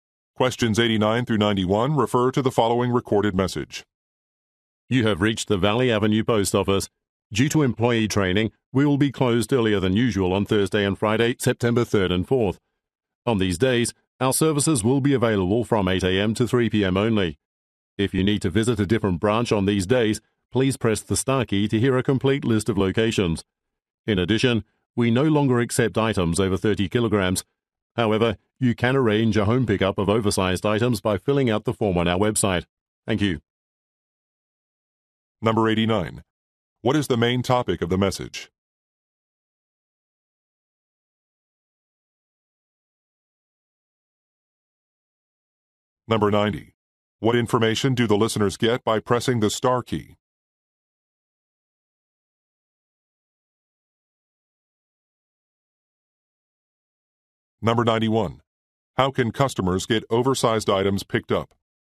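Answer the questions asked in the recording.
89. Shorter opening hours on September 3rd and 4th
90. A list of other branch locations
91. By filling out a form on the website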